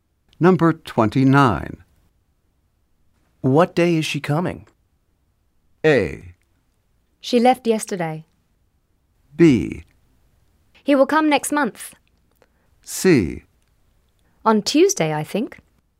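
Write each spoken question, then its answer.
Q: What day is she coming?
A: C: On Tuesday, I think.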